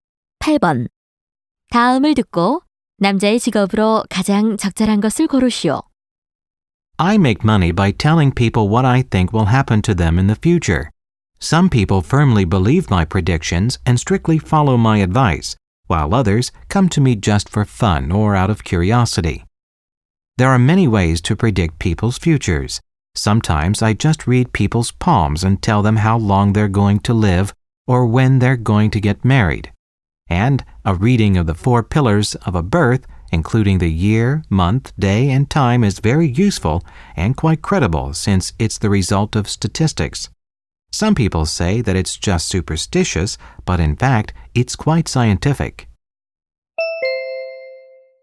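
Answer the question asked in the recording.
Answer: 점술가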